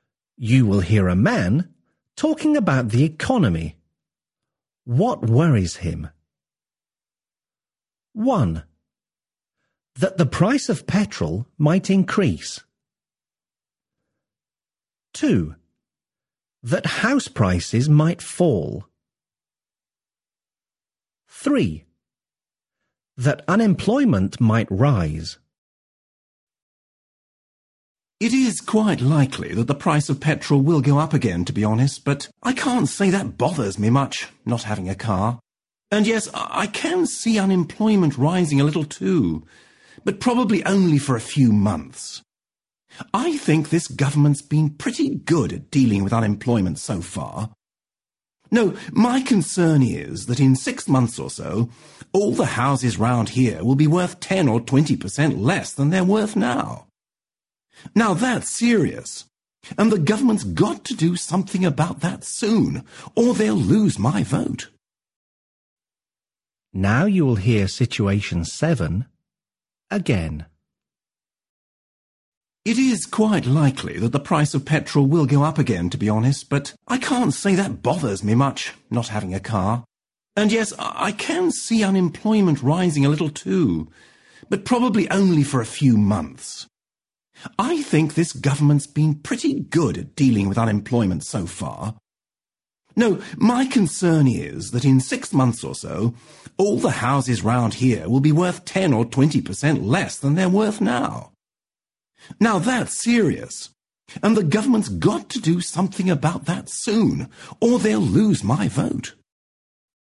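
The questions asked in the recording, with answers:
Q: What worries him?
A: 2: That house prices might fall.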